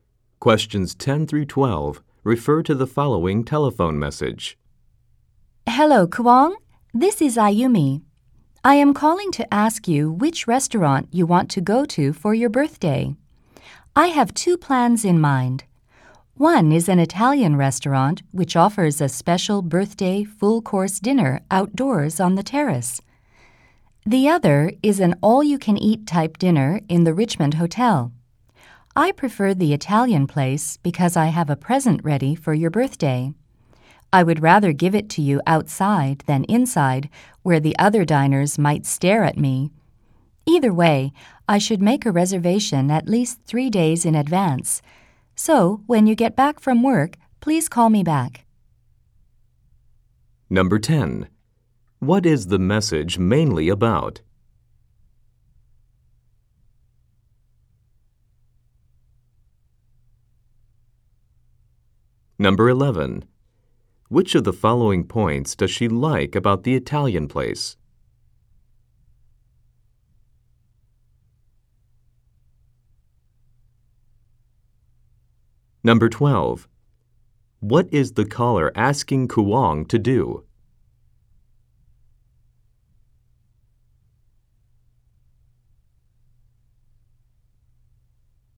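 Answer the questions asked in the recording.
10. Choosing a restaurant for Kuang's birthday dinner
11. The dinner is outdoors on the terrace
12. Call her back when he gets home from work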